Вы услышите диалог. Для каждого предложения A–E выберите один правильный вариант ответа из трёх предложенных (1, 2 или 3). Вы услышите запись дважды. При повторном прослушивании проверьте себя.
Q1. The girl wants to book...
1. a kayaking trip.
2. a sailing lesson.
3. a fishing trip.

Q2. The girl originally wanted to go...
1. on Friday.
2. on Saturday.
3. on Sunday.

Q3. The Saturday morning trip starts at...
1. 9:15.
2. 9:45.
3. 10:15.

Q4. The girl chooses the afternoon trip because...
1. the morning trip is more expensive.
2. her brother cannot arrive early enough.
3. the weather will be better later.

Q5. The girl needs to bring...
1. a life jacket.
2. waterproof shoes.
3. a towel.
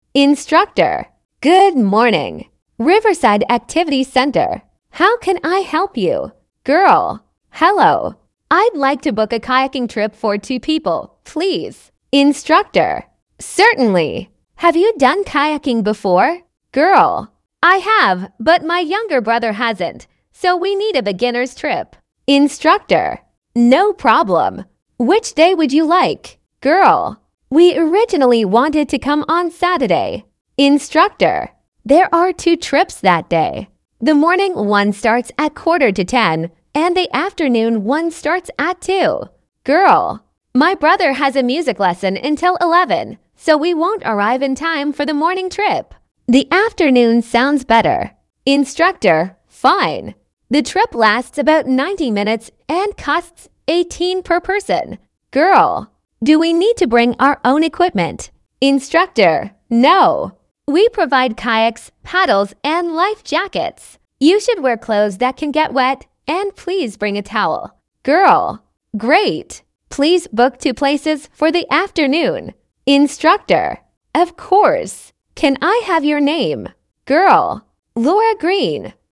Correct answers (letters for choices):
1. 1
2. 2
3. 2
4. 2
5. 3

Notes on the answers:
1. Лора хочет забронировать прогулку на каяках для двух человек.
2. Изначально Лора и её брат собирались приехать в субботу.
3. Утренняя субботняя прогулка начинается в 9:45.
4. Брат Лоры занят на музыкальном занятии до 11 часов, поэтому они не успевают на утреннюю поездку.
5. Каяки, вёсла и спасательные жилеты предоставляет центр. Участникам необходимо взять с собой полотенце.

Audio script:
Instructor: Good morning. Riverside Activity Centre. How can I help you?
Girl: Hello. I'd like to book a kayaking trip for two people, please.
Instructor: Certainly. Have you done kayaking before?
Girl: I have, but my younger brother hasn't, so we need a beginners' trip.
Instructor: No problem. Which day would you like?
Girl: We originally wanted to come on Saturday.
Instructor: There are two trips that day. The morning one starts at quarter to ten, and the afternoon one starts at two.
Girl: My brother has a music lesson until eleven, so we won't arrive in time for the morning trip. The afternoon sounds better.
Instructor: Fine. The trip lasts about ninety minutes and costs £18 per person.
Girl: Do we need to bring our own equipment?
Instructor: No. We provide kayaks, paddles and life jackets. You should wear clothes that can get wet, and please bring a towel.
Girl: Great. Please book two places for the afternoon.
Instructor: Of course. Can I have your name?
Girl: Laura Green.

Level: слегка повышенный уровень сложности